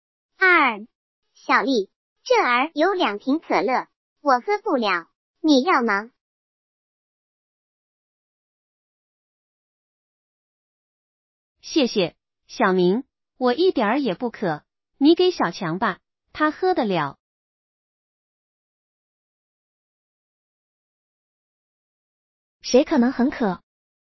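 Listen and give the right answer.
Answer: 小强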